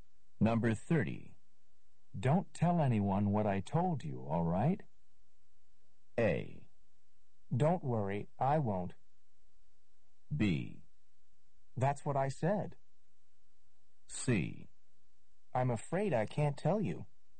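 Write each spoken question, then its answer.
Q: Don't tell anyone what I told you, all right?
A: A: Don't worry, I won't.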